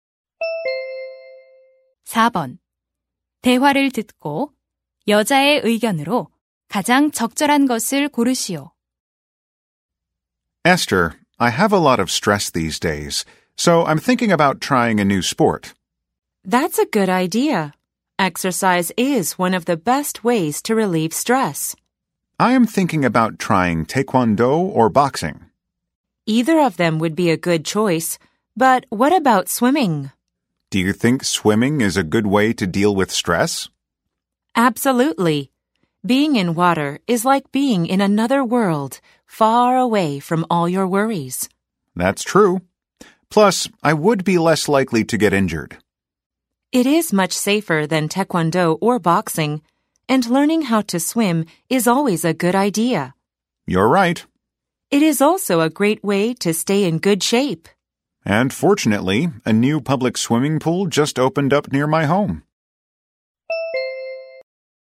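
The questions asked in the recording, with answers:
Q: 대화를 듣고 여자의 의견으로 가장 적절한 것을 고르시오.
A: 수영은 스트레스 해소에 좋은 방법이다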